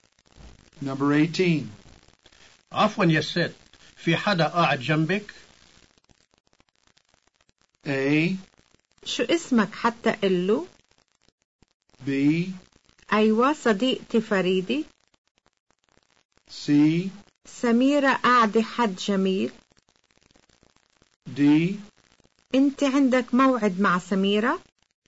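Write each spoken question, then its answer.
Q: عفوا يا ست، في حدا قاعد جنبك؟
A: B: أيوة صديقتي فريدي.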